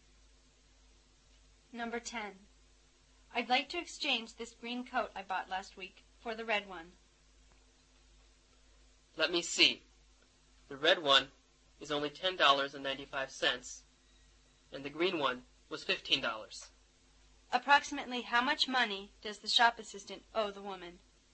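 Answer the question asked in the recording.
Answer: About $4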